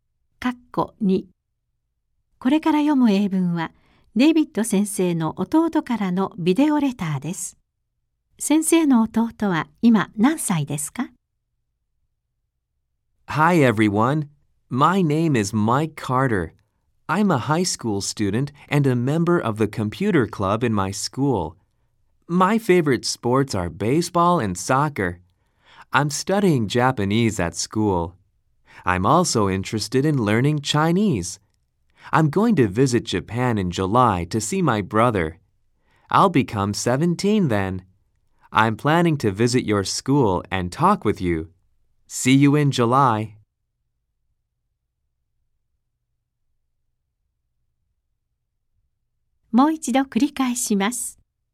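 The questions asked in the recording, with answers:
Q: 先生の弟は今何歳ですか?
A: 16歳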